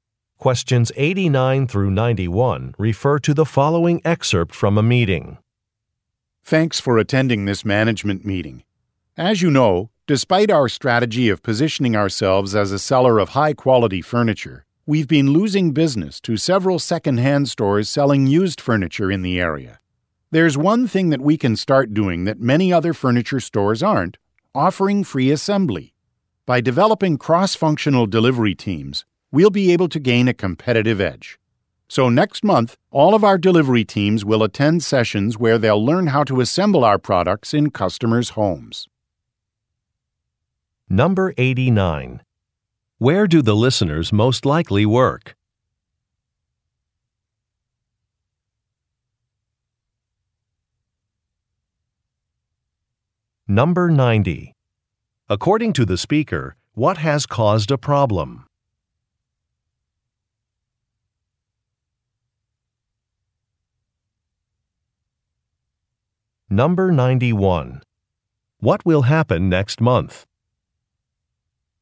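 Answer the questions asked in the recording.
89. At a furniture store
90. Competition from second-hand stores selling used furniture
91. Delivery teams will attend sessions to learn how to assemble products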